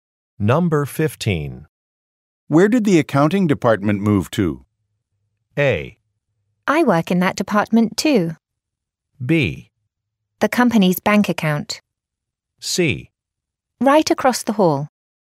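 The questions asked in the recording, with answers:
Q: Where did the accounting department move to?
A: C: Right across the hall.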